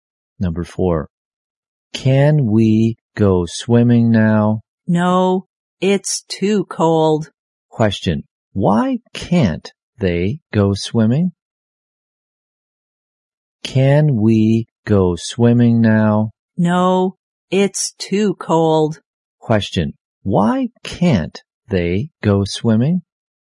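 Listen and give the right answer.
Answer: It's too cold.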